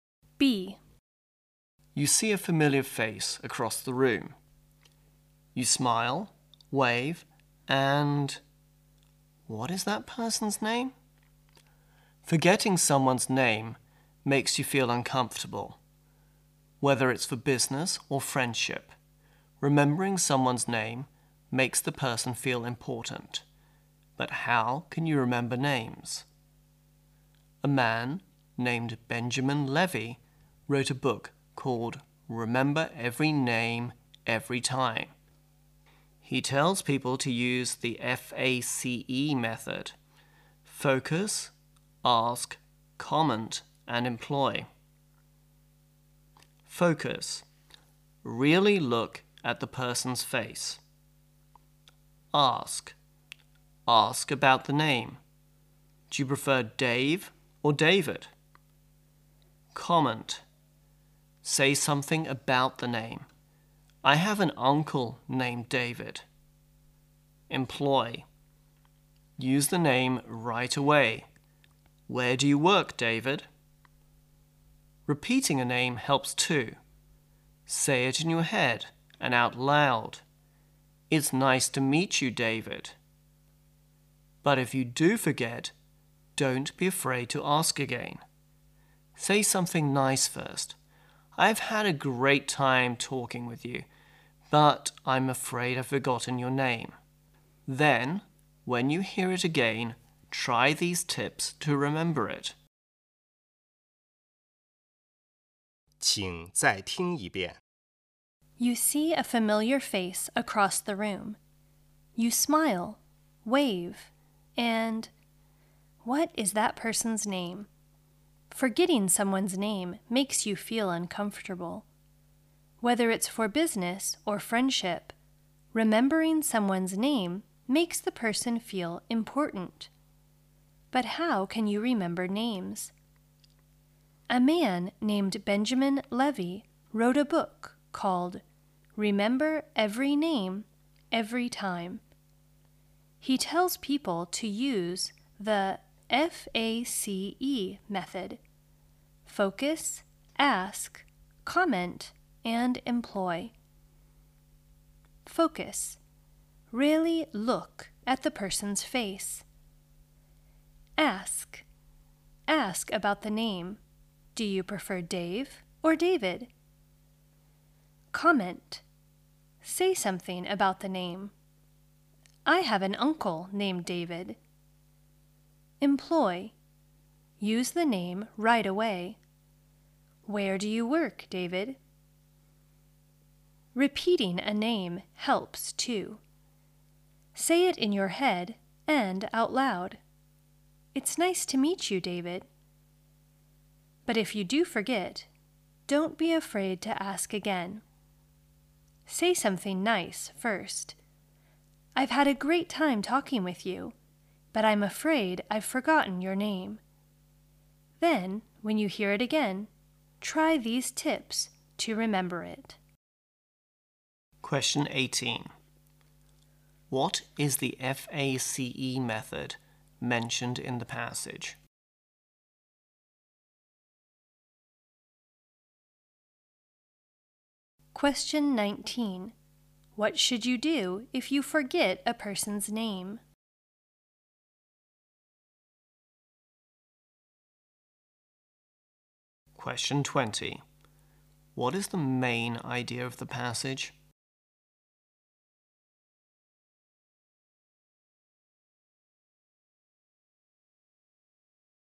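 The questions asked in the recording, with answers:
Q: What is the FACE method mentioned in the passage?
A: Focus, ask, comment and employ: a way to remember names.

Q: What should you do if you forget a person's name?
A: Say something nice first, then ask again.

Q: What is the main idea of the passage?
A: How to remember people's names.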